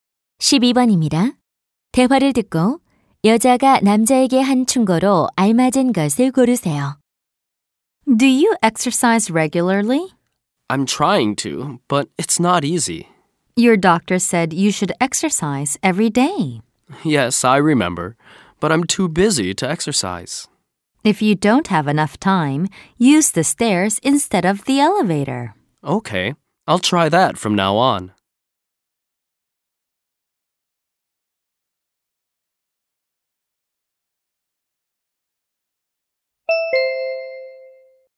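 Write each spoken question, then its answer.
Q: 대화를 듣고 여자가 남자에게 한 충고로 알맞은 것을 고르세요.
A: 엘리베이터 대신 계단을 이용하라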